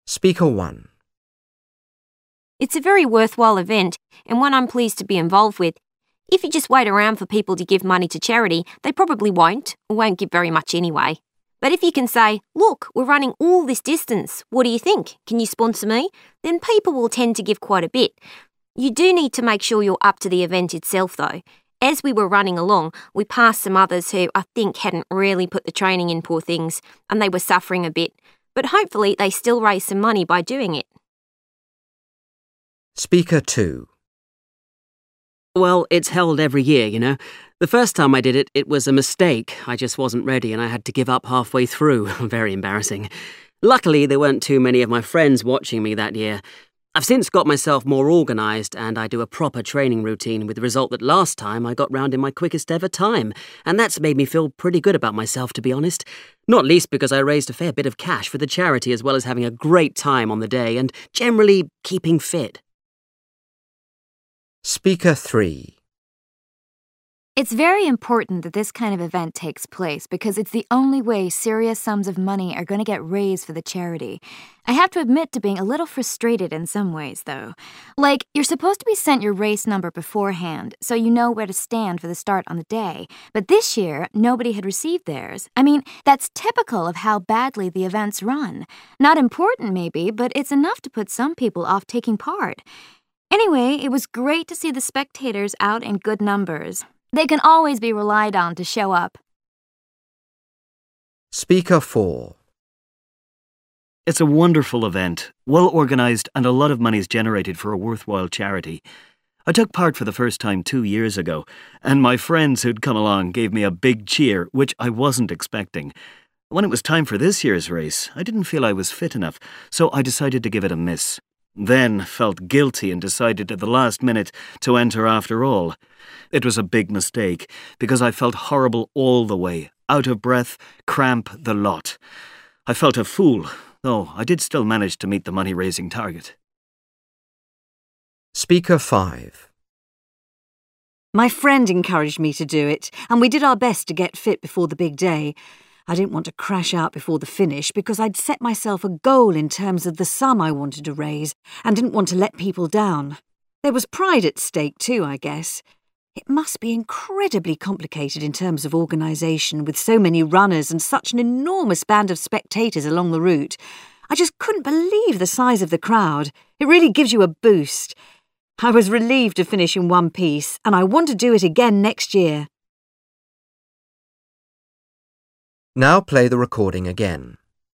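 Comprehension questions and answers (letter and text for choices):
Part 3: You will hear five different people talking about a charity running event. For questions 1-5, choose from the list (A-F) what each speaker says. Use the letters only once. There is one extra letter which you do not need to use.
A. I feel proud of my latest performance.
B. I don't think it was very well organised.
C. I felt sorry for the runners who weren't fit enough.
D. I was disappointed at the amount of money raised.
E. I was surprised by how many people came to watch.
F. I regret changing my mind about taking part.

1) Speaker 1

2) Speaker 2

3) Speaker 3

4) Speaker 4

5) Speaker 5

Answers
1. C. I felt sorry for the runners who weren't fit enough.
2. A. I feel proud of my latest performance.
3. B. I don't think it was very well organised.
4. F. I regret changing my mind about taking part.
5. E. I was surprised by how many people came to watch.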